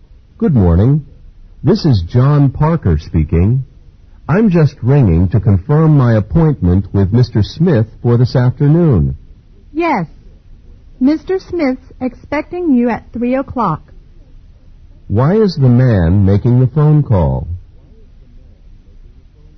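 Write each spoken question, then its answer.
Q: Why is the man making the phone call?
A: To confirm his appointment with Mr. Smith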